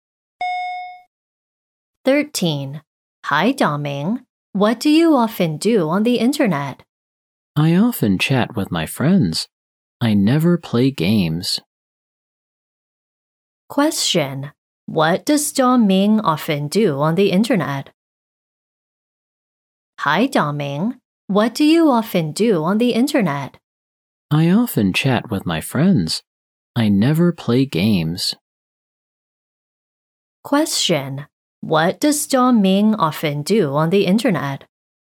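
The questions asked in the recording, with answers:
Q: Question. What does Daming often do on the internet?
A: He chats with his friends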